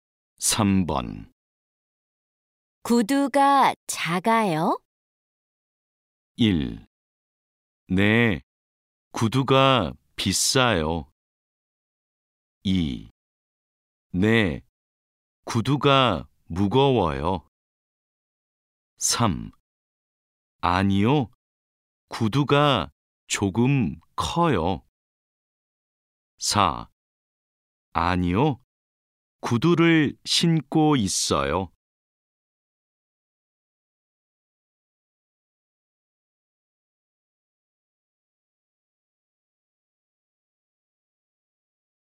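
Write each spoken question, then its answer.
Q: 구두가 작아요?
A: 3: 아니요, 구두가 조금 커요.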